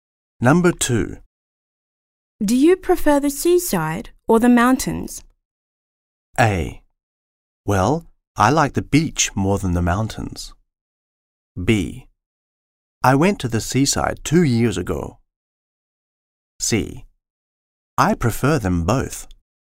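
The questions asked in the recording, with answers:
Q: Do you prefer the seaside or the mountains?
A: A: Well, I like the beach more than the mountains.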